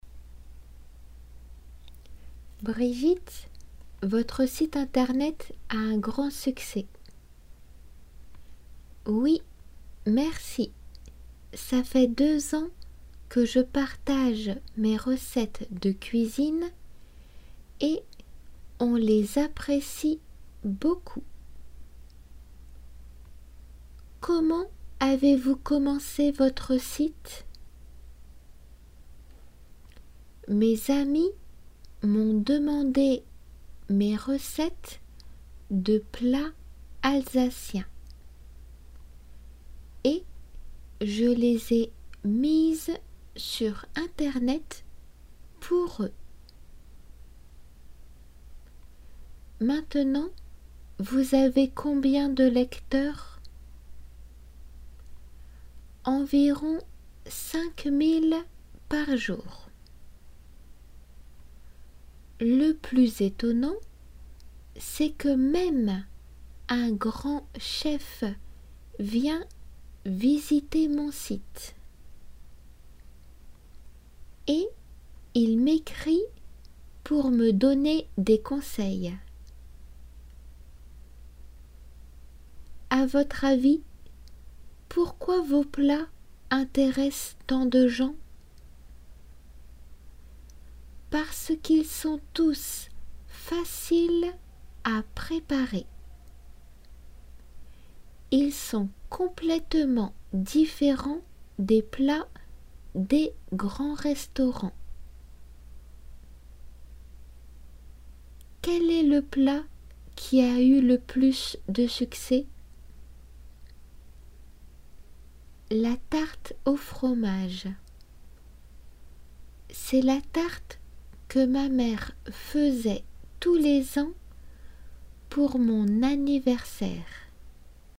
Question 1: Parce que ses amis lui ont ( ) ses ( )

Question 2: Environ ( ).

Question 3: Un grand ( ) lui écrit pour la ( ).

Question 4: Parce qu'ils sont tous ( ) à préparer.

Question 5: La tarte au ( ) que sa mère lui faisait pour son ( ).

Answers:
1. demandé recettes
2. 5000
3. chef conseiller
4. faciles
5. fromage anniversaire

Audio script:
Le journaliste: Brigitte, votre site internet a un grand succès.
Brigitte : Oui,merci ça fait deux ans que je partage mes recettes de cuisine et on les apprécie beaucoup.
L j : Comment avez vous commencé votre site ?
B : Mes amis m'ont demandé mes recettes de plats alsaciens. Et je les ai mises sur Internet pour eux.
L J : Maintenant vous avez combien de lecteurs ?
B : Environ 5,000 par jour . Le plus étonnant, c'est que même un grand chef vient visiter mon site ! Et il m'ecrit pour me donner des conseils !
LJ : À votre avis, pourquoi vos plats intéressent tant de gens ?
B : Parce qu'ils sont tous faciles à préparer. Ils sont complètement différents des plats des grands restaurants !
LJ : Quel est le plat qui a eu le plus succès ?
B : La tarte au fromage. C'est la tarte que ma mère faisait tous les ans pour mon
anniversaire !